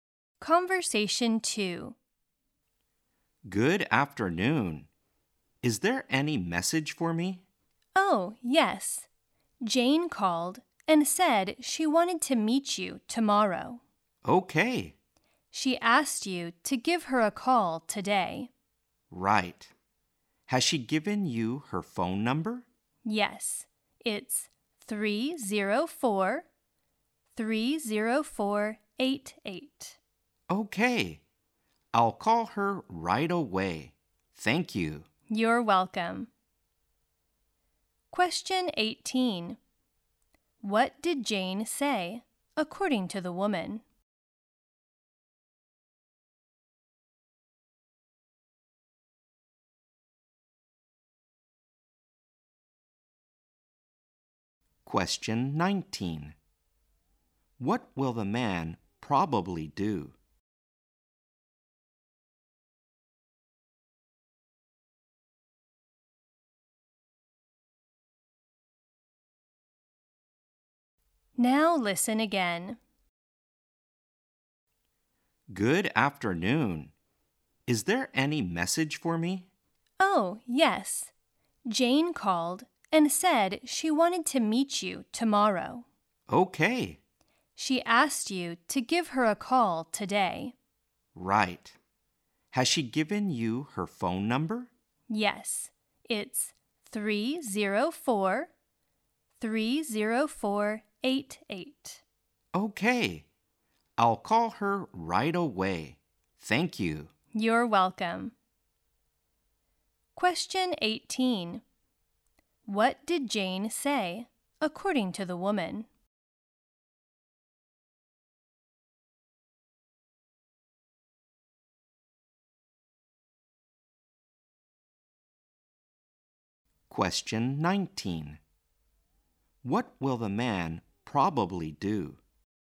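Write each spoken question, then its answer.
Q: What did Jane say, according to the woman?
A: She wanted to meet the man tomorrow.

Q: What will the man probably do?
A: Call Jane right away.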